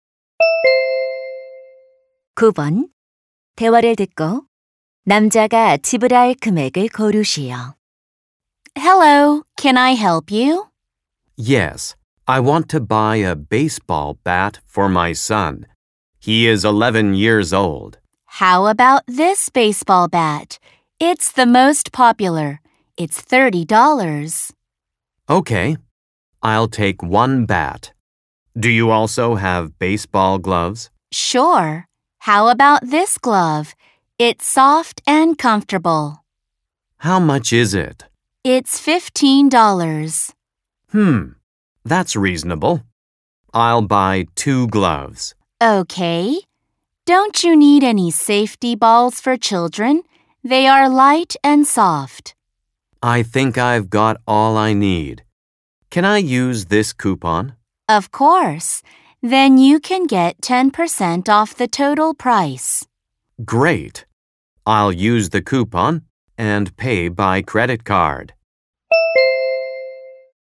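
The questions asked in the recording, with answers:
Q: 대화를 듣고 남자가 지불할 금액을 고르시오.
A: $54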